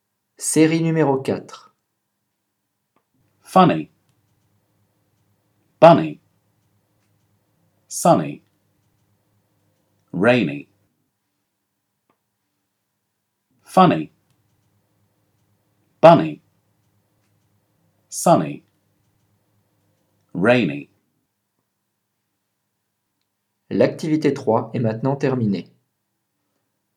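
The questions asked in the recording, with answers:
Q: Série numéro 4.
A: Rainy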